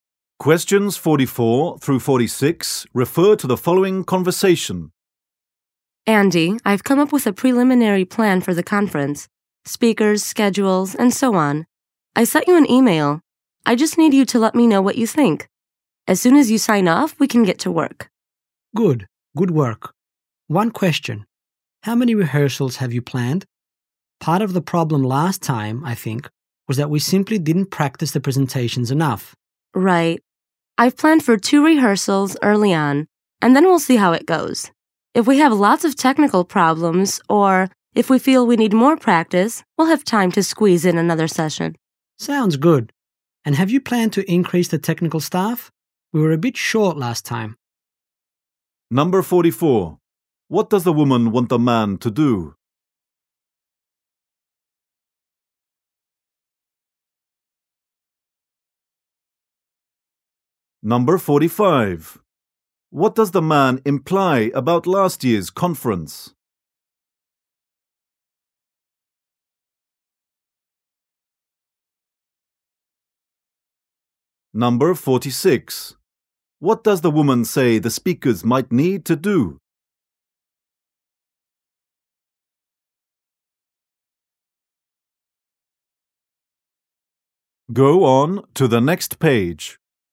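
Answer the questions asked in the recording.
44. Review her conference plan and give his opinion
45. The presentations were not practiced enough
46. Attend an extra rehearsal session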